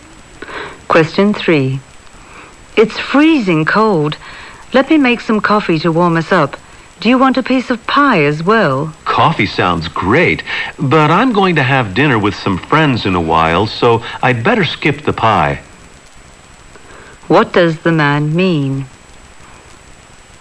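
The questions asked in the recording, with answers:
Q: What does the man mean?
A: He'll have coffee but skip the pie.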